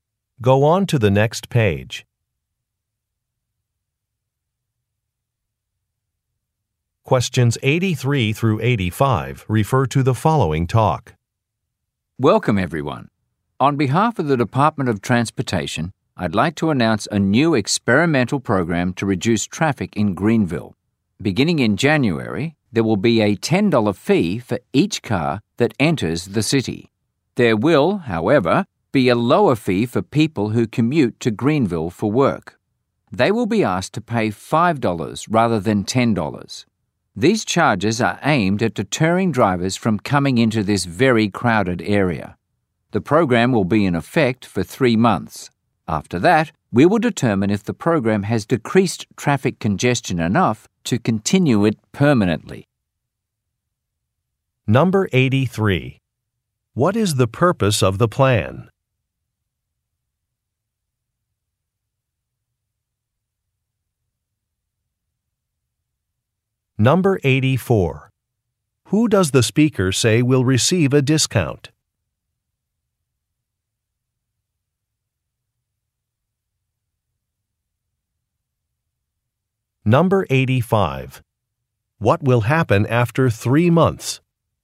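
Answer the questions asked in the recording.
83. To reduce traffic in Greenville
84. People who commute to Greenville for work
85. The program will be evaluated to decide whether to continue it permanently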